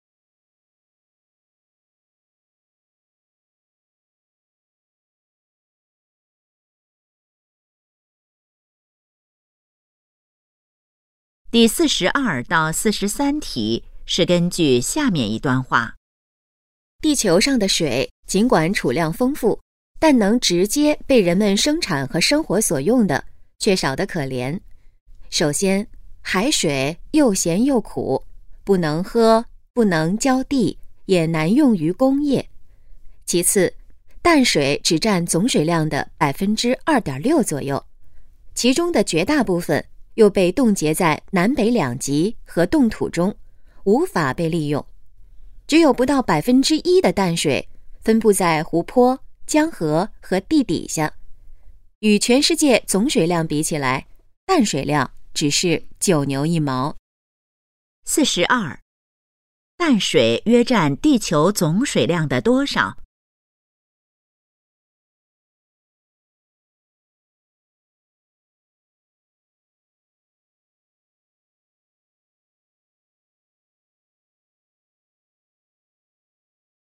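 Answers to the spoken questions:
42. 2.6%左右
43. 可利用的淡水很少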